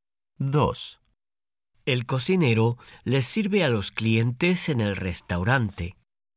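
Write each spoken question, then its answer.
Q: El cocinero les sirve a los clientes en el restaurante.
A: No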